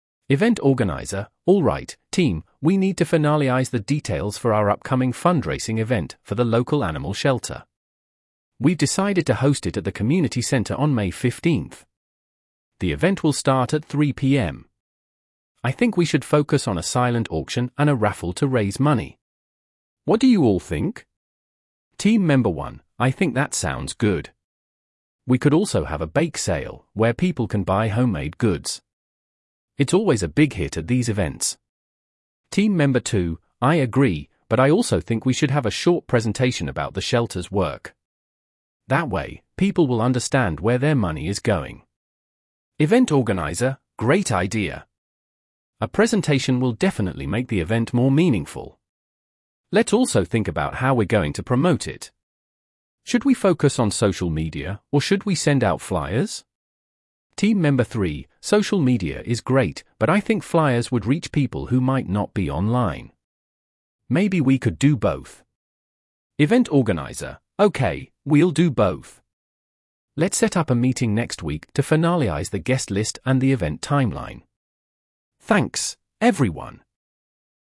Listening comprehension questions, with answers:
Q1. Where will the fundraising event be held?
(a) At a park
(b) At a school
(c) At the community center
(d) At a hotel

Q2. What is the main focus of the event?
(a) A charity concert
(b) A silent auction and raffle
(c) A car wash fundraiser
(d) A clothing drive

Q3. What additional activity does Team Member 1 suggest?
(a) A live auction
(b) A bake sale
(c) A charity run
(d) A painting exhibition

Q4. What does Team Member 2 propose to include in the event?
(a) A dance performance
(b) A presentation about the shelter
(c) A musical performance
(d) A photo booth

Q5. How does the team decide to promote the event?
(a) Only through social media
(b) Only with flyers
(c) With both social media and flyers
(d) By word of mouth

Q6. What will the team do at the next meeting?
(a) Finalize the event's timeline and guest list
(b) Plan the entertainment for the event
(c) Create a list of sponsors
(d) Choose the location for the event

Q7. What is the main goal of the fundraising event?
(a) To promote the animal shelter's work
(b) To provide entertainment for the community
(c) To raise money for the shelter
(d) To meet new people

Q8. What date is the event scheduled for?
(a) June 1st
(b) May 15th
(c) May 30th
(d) June 15th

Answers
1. (c) At the community center
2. (b) A silent auction and raffle
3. (b) A bake sale
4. (b) A presentation about the shelter
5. (c) With both social media and flyers
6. (a) Finalize the event's timeline and guest list
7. (c) To raise money for the shelter
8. (b) May 15th

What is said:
Event Organizer: "Alright, team, we need to finalize the details for our upcoming fundraising event for the local animal shelter. We've decided to host it at the community center on May 15th. I think we should focus on a silent auction and a raffle to raise money. What do you all think?"
Team Member 1: "I think that sounds good. We could also have a bake sale, where people can buy homemade goods. It's always a big hit at these events."
Team Member 2: "I agree, but I also think we should have a short presentation about the shelter's work. That way, people will understand where their money is going."
Event Organizer: "Great idea! A presentation will definitely make the event more meaningful. Let's also think about how we're going to promote it. Should we focus on social media, or should we send out flyers?"
Team Member 3: "Social media is great, but I think flyers would reach people who might not be online. Maybe we could do both."
Event Organizer: "Okay, we'll do both. Let's set up a meeting next week to finalize the guest list and the event timeline. Thanks, everyone!"

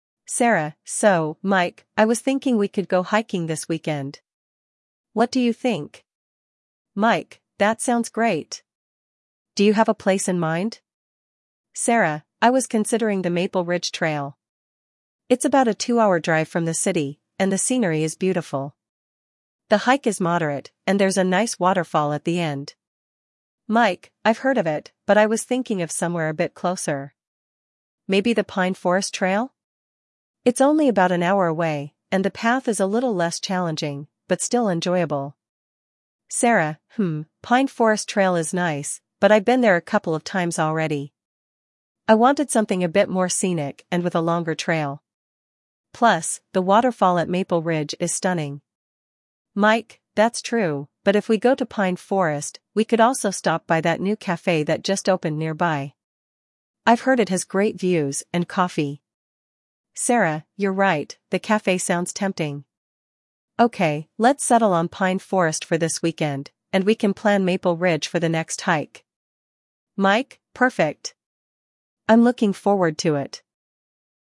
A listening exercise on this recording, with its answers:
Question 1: What is the main topic of discussion?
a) Deciding on a camping trip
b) Choosing a weekend hiking location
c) Planning a road trip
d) Organizing a picnic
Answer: b) Choosing a weekend hiking location

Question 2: Which hiking trail does Sarah suggest initially?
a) Pine Forest Trail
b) Maple Ridge Trail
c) Oak Mountain Trail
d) River Walk Trail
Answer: b) Maple Ridge Trail

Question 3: Why does Mike suggest Pine Forest Trail?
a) It is more scenic than other trails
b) It is closer to the city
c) It has a waterfall at the end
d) He has never hiked there before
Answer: b) It is closer to the city

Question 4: What does Sarah like about Maple Ridge Trail?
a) It is an easier trail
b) It is very close to the city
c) It has a beautiful waterfall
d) It is a shorter hike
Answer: c) It has a beautiful waterfall

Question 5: What does Mike mention as an alternative to hiking?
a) A visit to a museum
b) A trip to a café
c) A day at the beach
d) Going to a concert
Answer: b) A trip to a café

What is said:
Sarah: So, Mike, I was thinking we could go hiking this weekend. What do you think?
Mike: That sounds great! Do you have a place in mind?
Sarah: I was considering the Maple Ridge Trail. It's about a two-hour drive from the city, and the scenery is beautiful. The hike is moderate, and there's a nice waterfall at the end.
Mike: I've heard of it, but I was thinking of somewhere a bit closer. Maybe the Pine Forest Trail? It's only about an hour away, and the path is a little less challenging, but still enjoyable.
Sarah: Hmm, Pine Forest Trail is nice, but I've been there a couple of times already. I wanted something a bit more scenic and with a longer trail. Plus, the waterfall at Maple Ridge is stunning.
Mike: That's true, but if we go to Pine Forest, we could also stop by that new café that just opened nearby. I've heard it has great views and coffee.
Sarah: You're right, the café sounds tempting. Okay, let's settle on Pine Forest for this weekend, and we can plan Maple Ridge for the next hike.
Mike: Perfect! I'm looking forward to it.

